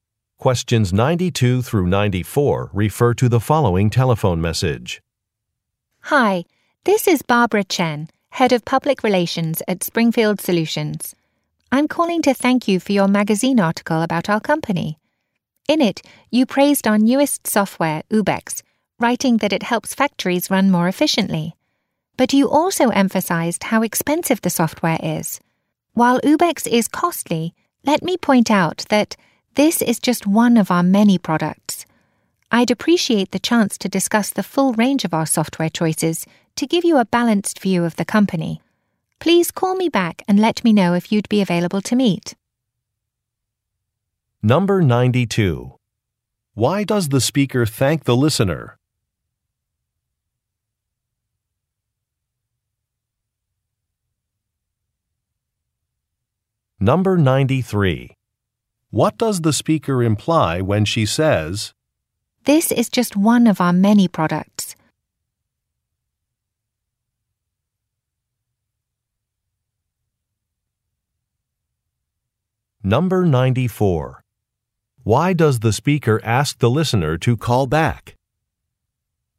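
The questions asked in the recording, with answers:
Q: Why does the speaker thank the listener?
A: For writing a magazine article about her company

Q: Why does the speaker ask the listener to call back?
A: To arrange a meeting to discuss the company's full range of software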